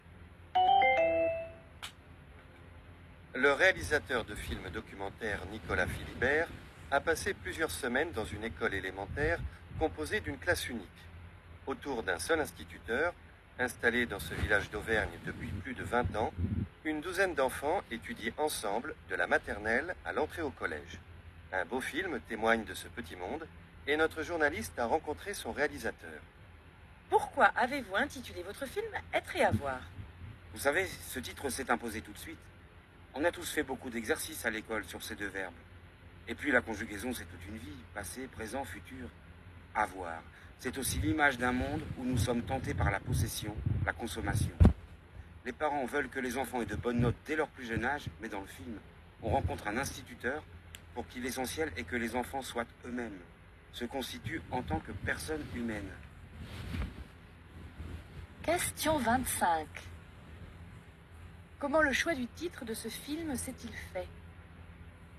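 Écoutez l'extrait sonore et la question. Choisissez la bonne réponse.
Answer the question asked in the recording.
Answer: Le titre s'est imposé tout de suite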